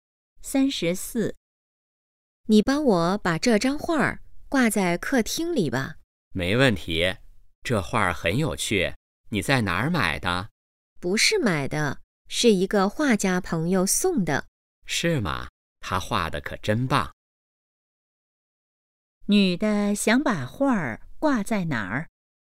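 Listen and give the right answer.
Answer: 客厅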